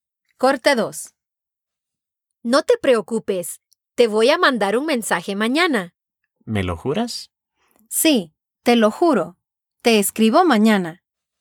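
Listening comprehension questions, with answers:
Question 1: ¿Quién va a mandar un mensaje a quién? (Who is going to send a message to whom?)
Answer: María va a mandarle un mensaje a Juan.

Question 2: ¿Qué le jura María a Juan?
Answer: Que le va a escribir (mandar un mensaje) mañana.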